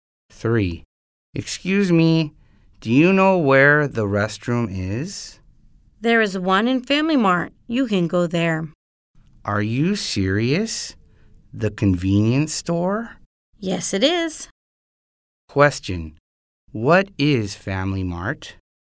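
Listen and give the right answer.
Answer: A convenience store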